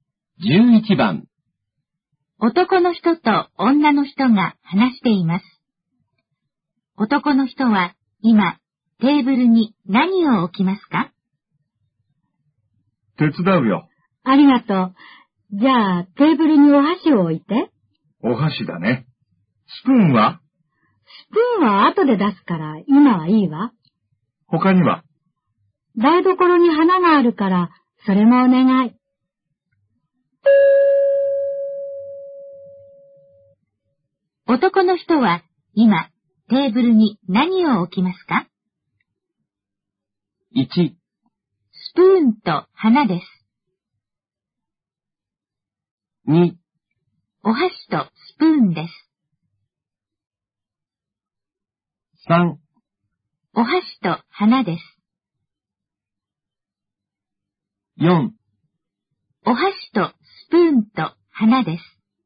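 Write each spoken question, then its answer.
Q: 男の人は今テーブルに何を置きますか?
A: 3: お箸と花です。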